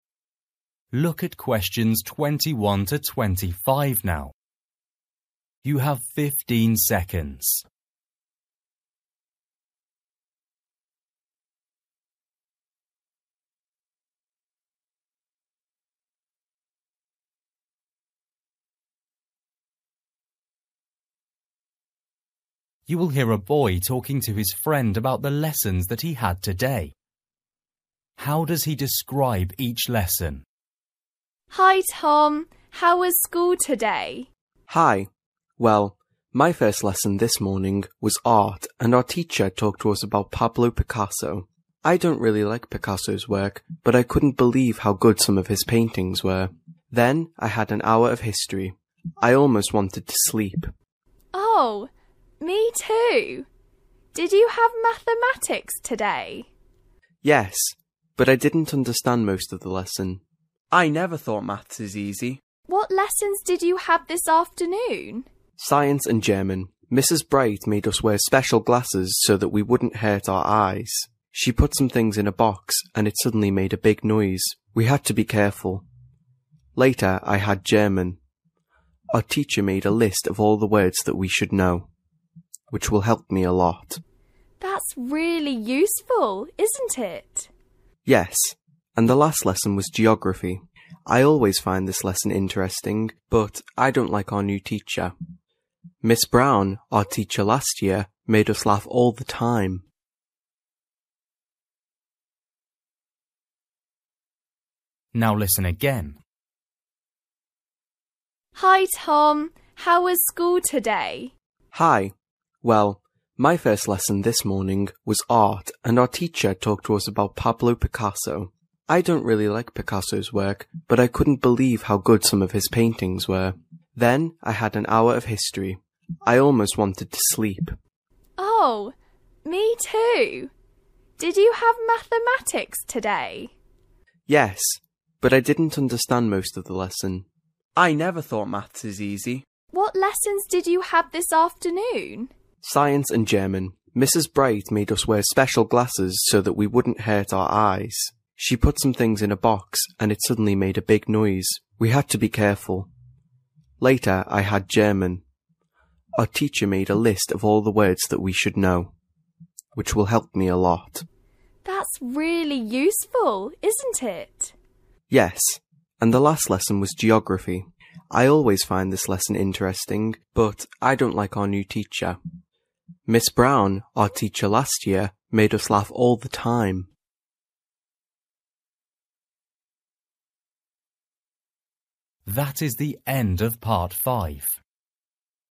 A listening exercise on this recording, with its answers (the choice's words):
For each question, choose the correct answer.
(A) interesting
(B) funny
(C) difficult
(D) dangerous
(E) boring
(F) surprising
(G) easy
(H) useful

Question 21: History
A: boring

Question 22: Mathematics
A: difficult

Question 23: Science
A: dangerous

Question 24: German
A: useful

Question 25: Geography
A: interesting

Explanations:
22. Yes, but I didn't understand most of the lesson. I never thought Maths is easy.
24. That's really useful, isn't it?

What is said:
Girl: Hi Tom, how was school today?
Boy: Hi! Well, my first lesson this morning was Art and our teacher talked to us about Pablo Picasso. I don't really like Picasso's work but I couldn't believe how good some of his paintings were. (21) Then I had an hour of History. I almost wanted to sleep.
Girl: Oh, me too. (22) Did you have Mathematics today?
Boy: (22) Yes, but I didn't understand most of the lesson. I never thought Maths is easy.
Girl: What lessons did you have this afternoon?
Boy: (23) Science and German. Mrs Bright made us (23) wear special glasses so that we wouldn't hurt our eyes. She put some things in a box and it suddenly made a big noise. (23) We had to be careful. Later, I had (24) German. Our teacher made a list of all the words that we should know which will help me a lot.
Girl: (24) That's really useful, isn't it?
And the last lesson was (25) Geography. I always find this lesson interesting. But I don't like our new teacher. Miss Brown, our teacher last year, made us laugh all the time.

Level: KET (A2)